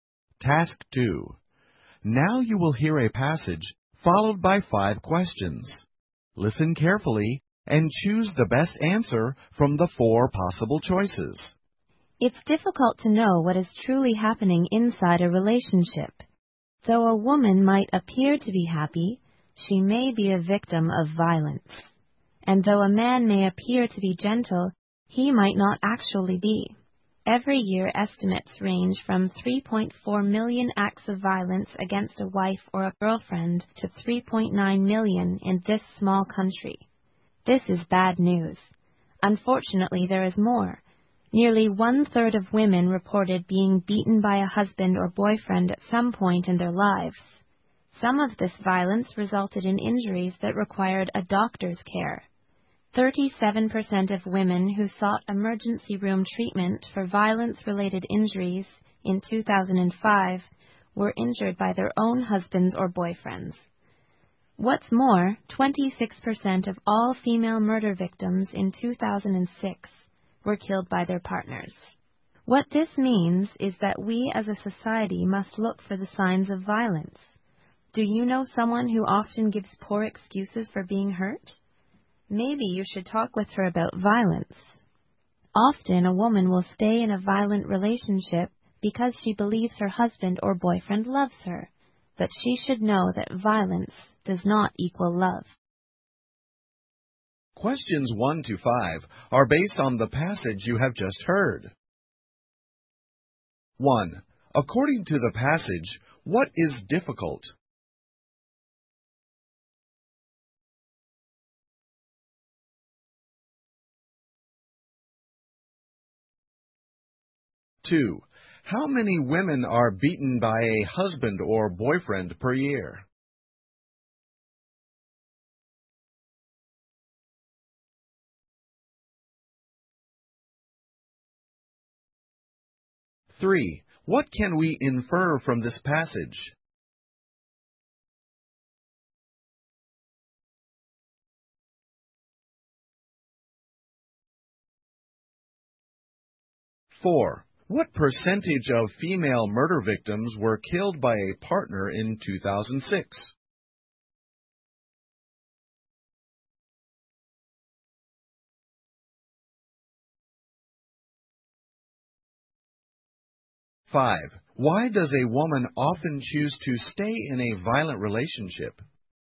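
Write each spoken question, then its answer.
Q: According to the passage, what is difficult?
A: Knowing what is truly happening inside a relationship

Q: What percentage of female murder victims were killed by a partner in 2006?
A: 26%

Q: Why does a woman often choose to stay in a violent relationship?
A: She believes her husband or boyfriend loves her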